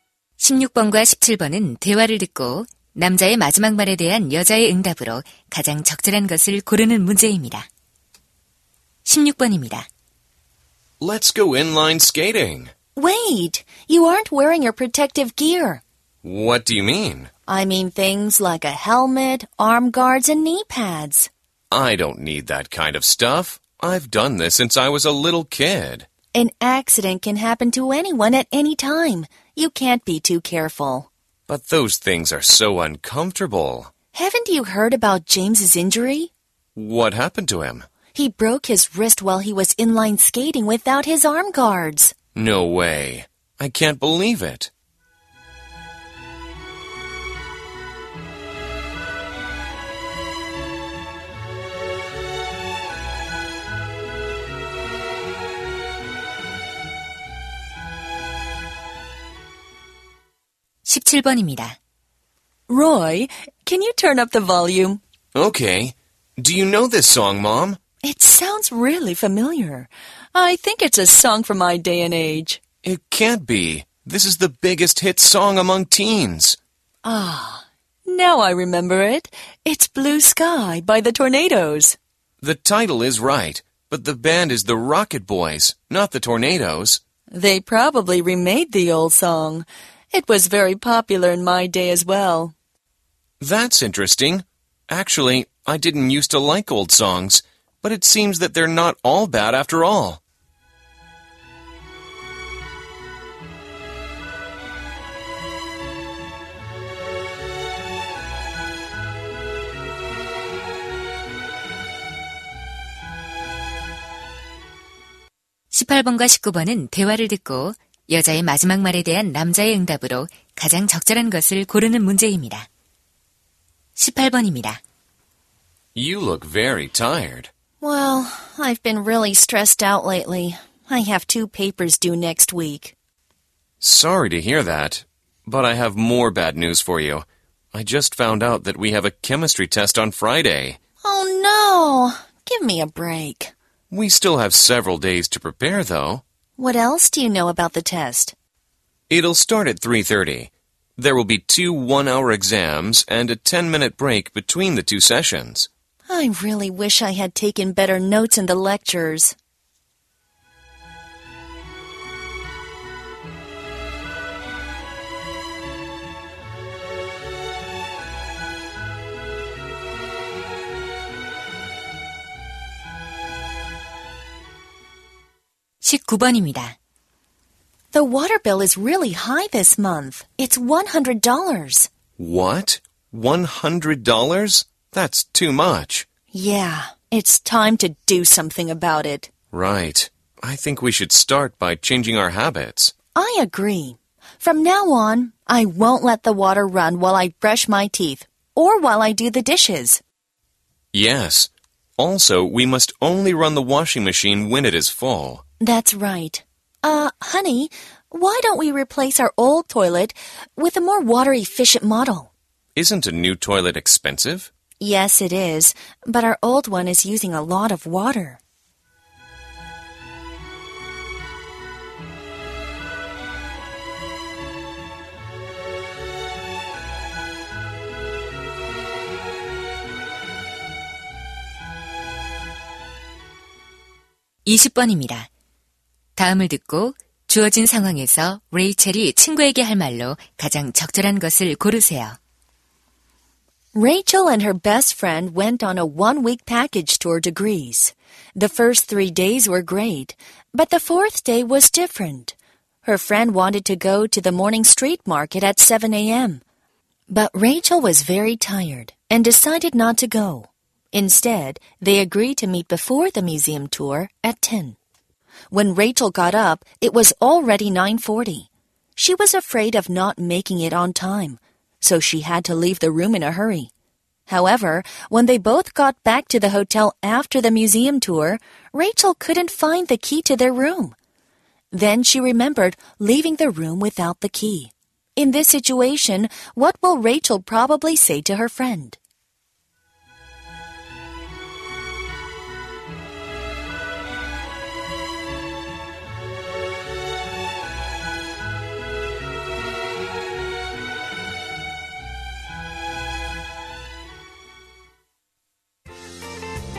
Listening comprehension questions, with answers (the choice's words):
다음을 듣고, 주어진 상황에서 Rachel친구에게 할 말로 가장 적절한 것을 고르시오.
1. I think we are locked out.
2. You're always forgetful.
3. So, what's your key point?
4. There isn't much space in our room.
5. You should have been to the street market.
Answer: I think we are locked out.

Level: 고2